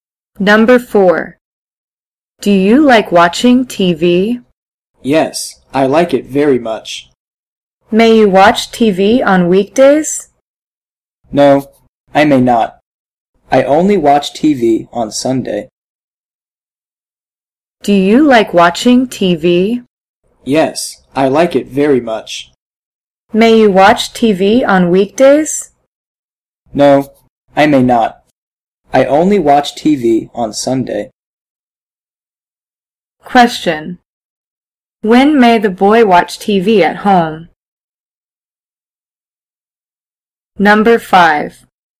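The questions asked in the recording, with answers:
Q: When may the boy watch TV at home?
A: On Sunday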